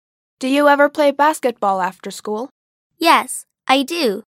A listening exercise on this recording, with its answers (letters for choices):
«با توجه به فایل صوتی، گزینه مناسب را انتخاب کنید»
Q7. Does she ever play basketball after school?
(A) Yes, she does.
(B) No, she doesn't.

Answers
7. A